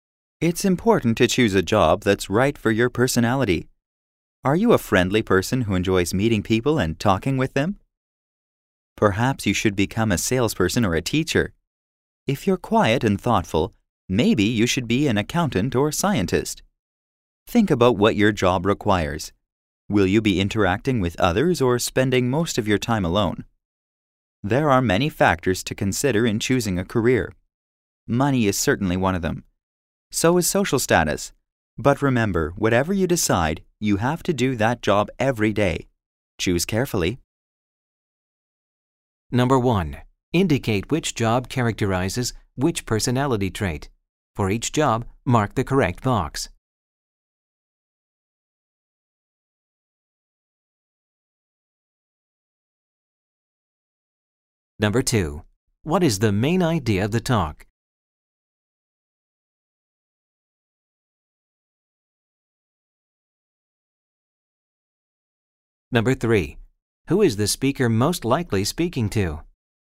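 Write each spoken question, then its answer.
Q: What is the main idea of the talk?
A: It's important to choose a job that suits your personality.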